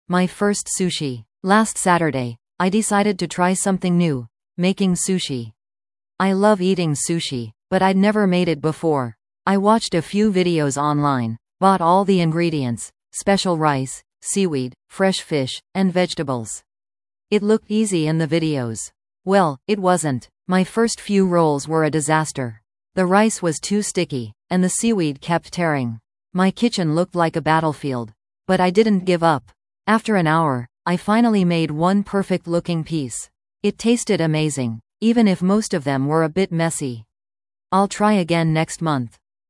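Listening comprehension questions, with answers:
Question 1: What new thing did the speaker try last Saturday?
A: Making sushi

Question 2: What was difficult for the speaker when making sushi?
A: The rice was too sticky and the seaweed kept tearing

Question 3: How did the speaker feel about the taste of the sushi?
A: It tasted amazing

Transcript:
My First Sushi
Last Saturday, I decided to try something new: making sushi! I love eating sushi, but I'd never made it before. I watched a few videos online, bought all the ingredients – special rice, seaweed, fresh fish, and vegetables. It looked easy in the videos. Well, it wasn't! My first few rolls were a disaster. The rice was too sticky, and the seaweed kept tearing. My kitchen looked like a battlefield. But I didn't give up. After an hour, I finally made one perfect-looking piece. It tasted amazing, even if most of them were a bit messy. 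I'll try again next month!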